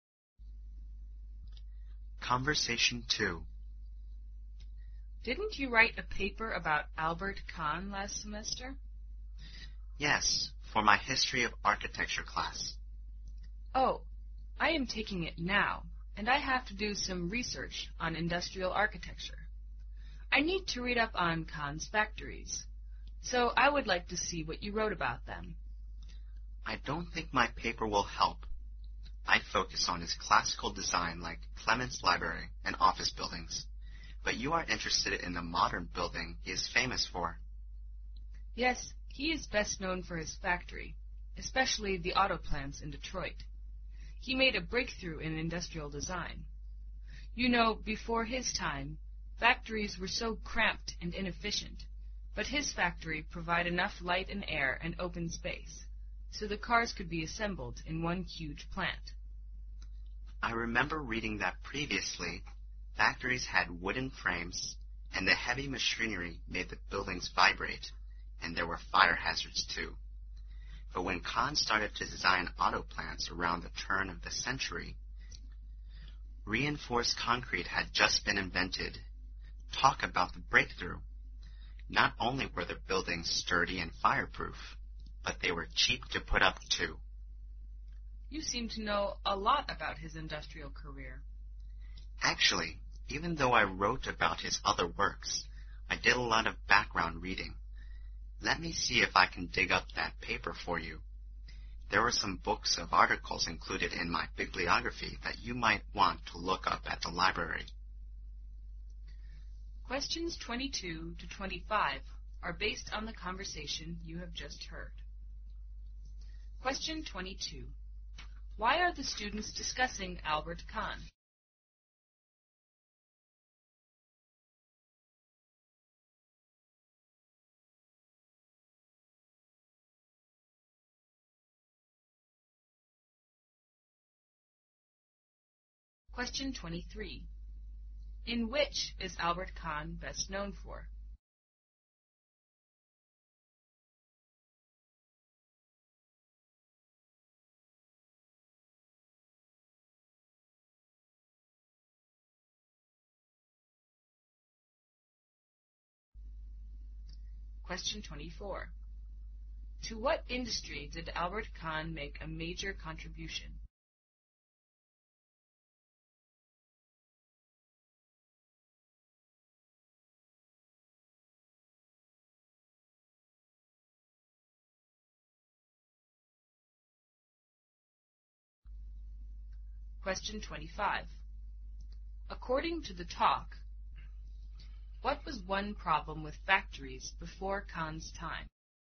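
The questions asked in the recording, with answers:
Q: In which is Albert Kahn best known for?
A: His factories.

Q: To what industry did Albert Kahn make a major contribution?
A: The auto industry.

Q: According to the talk, what was one problem with factories before Kahn's time?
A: They were cramped and had wooden frames, so they shook under heavy machinery and were fire hazards.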